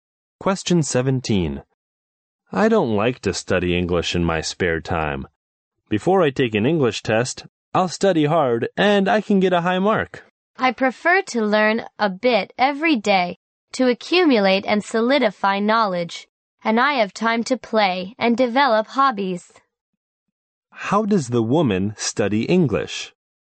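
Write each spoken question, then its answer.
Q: How does the woman study English?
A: She studies a little every day.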